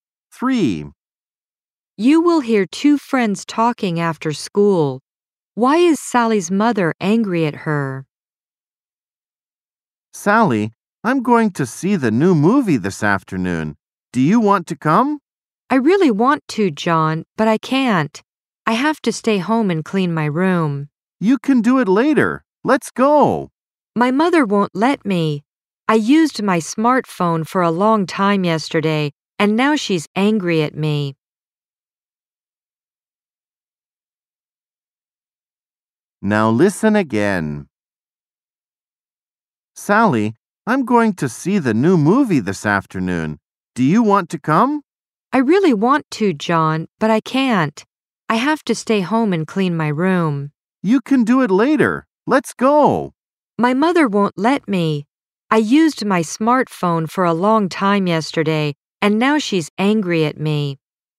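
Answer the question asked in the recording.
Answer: She used her smartphone for a long time yesterday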